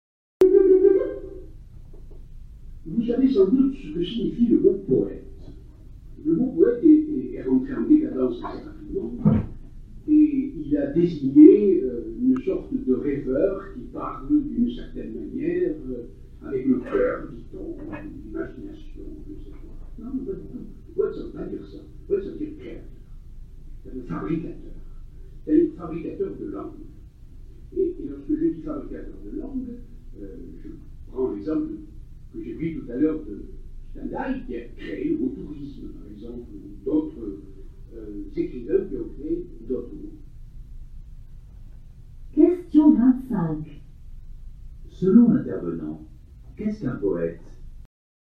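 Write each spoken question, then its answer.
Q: Selon l'intervenant, qu'est-ce qu'un poète?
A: Un créateur, un fabricateur de langue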